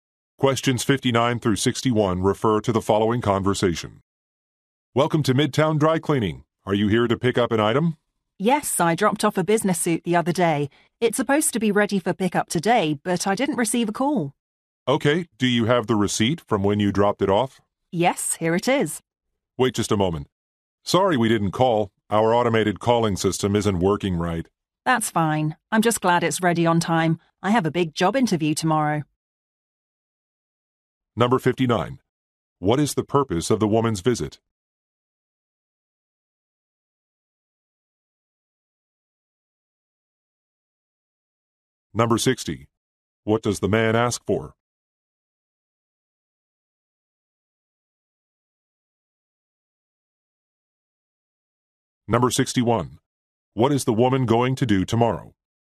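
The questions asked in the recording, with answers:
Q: What is the purpose of the woman's visit?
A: To pick up a business suit

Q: What does the man ask for?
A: The receipt

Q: What is the woman going to do tomorrow?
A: Go to a job interview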